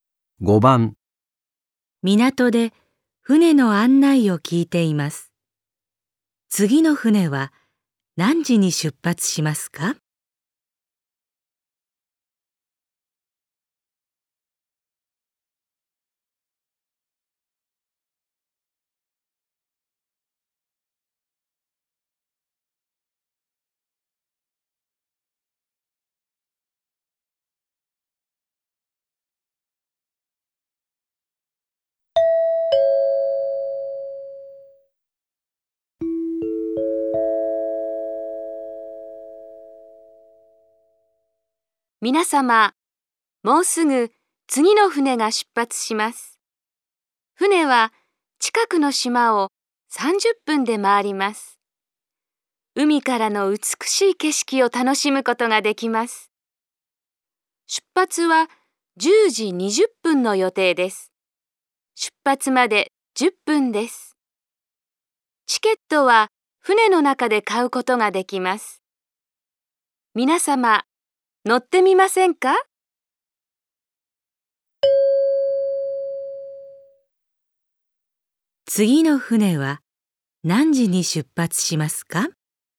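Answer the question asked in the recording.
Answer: 10時20分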